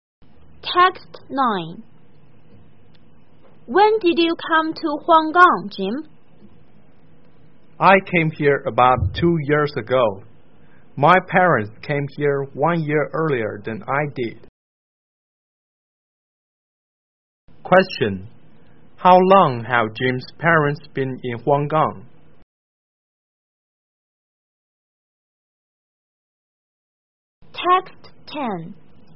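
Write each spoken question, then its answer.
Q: How long have Jim's parents been in Huanggang?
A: About 3 years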